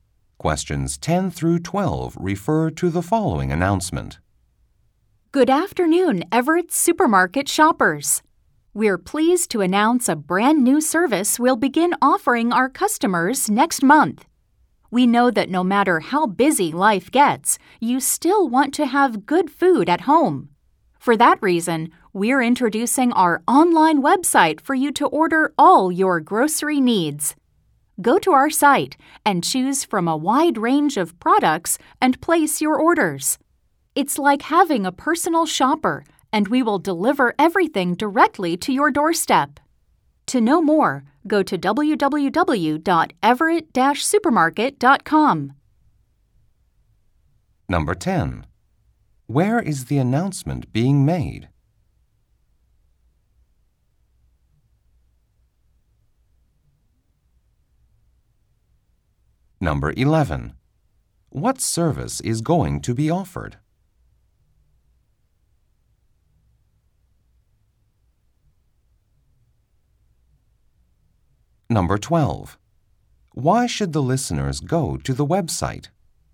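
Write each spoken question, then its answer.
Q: Where is the announcement being made?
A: At a supermarket (Everett's)

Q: What service is going to be offered?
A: Online grocery ordering with home delivery

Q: Why should the listeners go to the website?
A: To learn more about the service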